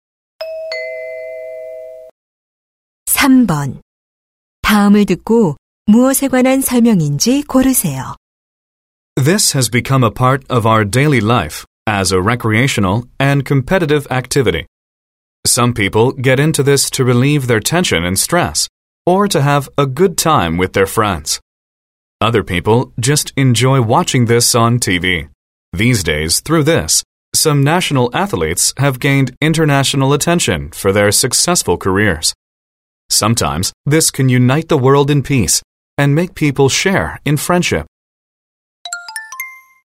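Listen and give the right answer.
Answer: 스포츠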